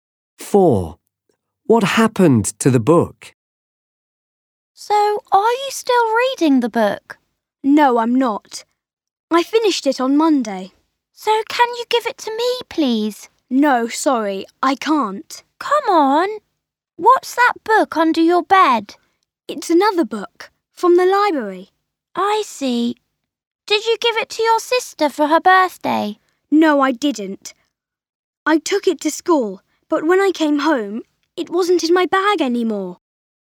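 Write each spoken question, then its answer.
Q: What happened to the book?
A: He lost it; it disappeared from his bag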